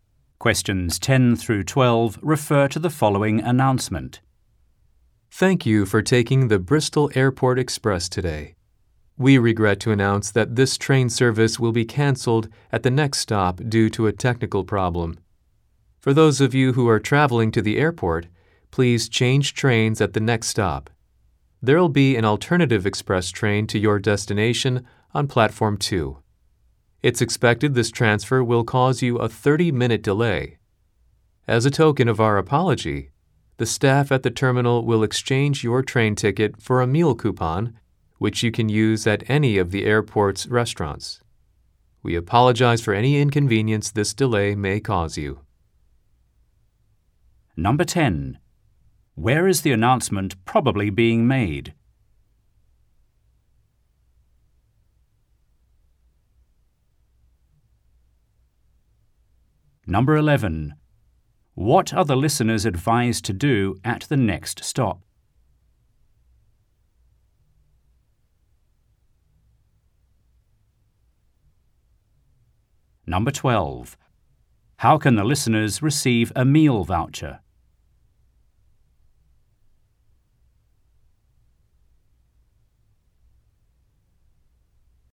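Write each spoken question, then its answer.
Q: Where is the announcement probably being made?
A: On a train

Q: What are the listeners advised to do at the next stop?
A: Change trains

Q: How can the listeners receive a meal voucher?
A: By exchanging their train ticket with the terminal staff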